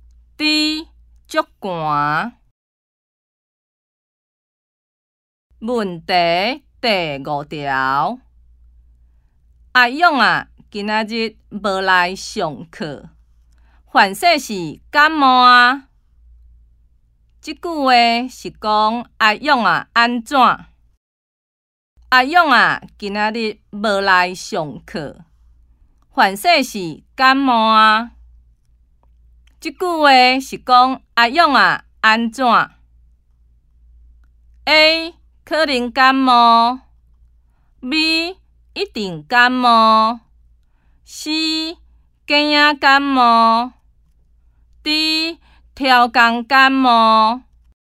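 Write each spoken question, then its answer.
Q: 即句话是讲阿勇啊安怎?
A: A: 可能感冒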